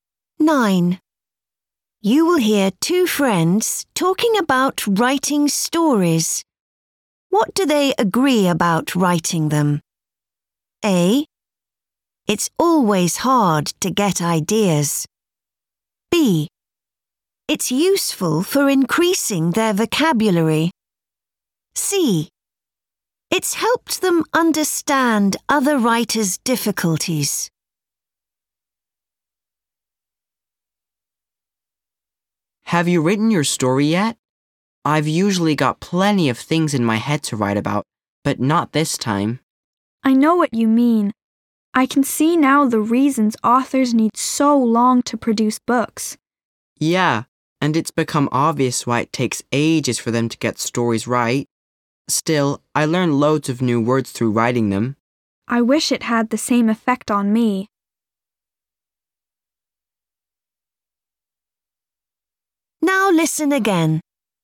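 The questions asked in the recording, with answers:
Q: What do they agree about writing them?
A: C: It's helped them understand other writers' difficulties.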